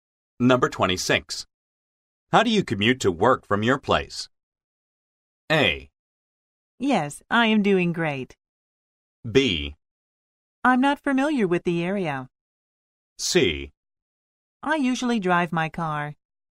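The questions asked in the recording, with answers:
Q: How do you commute to work from your place?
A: C: I usually drive my car.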